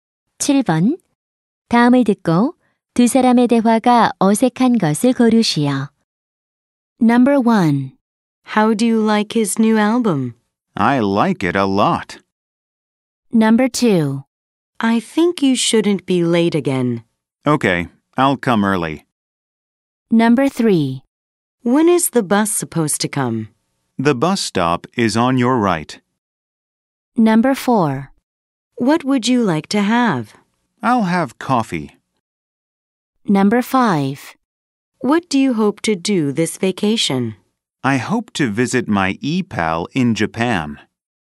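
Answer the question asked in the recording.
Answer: 3: When is the bus supposed to come? / The bus stop is on your right.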